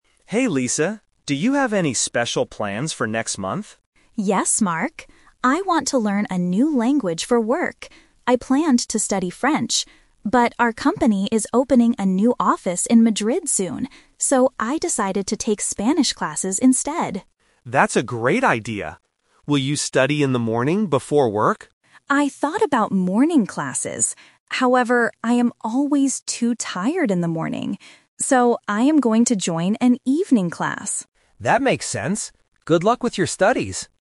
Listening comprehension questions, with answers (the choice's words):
Listen to the conversation between two colleagues and choose the correct answer (A, B, or C) for each question.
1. What language is Lisa going to study?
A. French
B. Spanish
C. German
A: Spanish

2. Why is Lisa learning a new language?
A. For her work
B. For her next vacation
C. To talk to her family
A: For her work

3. When will Lisa take her language classes?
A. In the morning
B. In the afternoon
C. In the evening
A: In the evening

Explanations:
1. Lisa says she planned to study French first (The Trap). However, because her company is opening an office in Madrid, she uses "So" to state her final decision: "I decided to take Spanish classes instead." German is not mentioned.
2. Lisa clearly states in her first sentence, "I want to learn a new language for work," and she mentions her company opening a new office. Options B (vacation) and C (family) are plausible reasons to learn a language, but they are not mentioned in the audio.
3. Mark asks if she will study in the morning (The Trap), and Lisa admits she thought about it. But she uses the word "However" to explain she is too tired then. Her final plan is to "join an evening class." The afternoon is not mentioned.

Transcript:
Mark: Hey Lisa, do you have any special plans for next month?
Lisa: Yes, Mark. I want to learn a new language for work. I planned to study French. But, our company is opening a new office in Madrid soon. So, I decided to take Spanish classes instead.
Mark: That's a great idea! Will you study in the morning before work?
Lisa: I thought about morning classes. However, I am always too tired in the morning. So, I am going to join an evening class.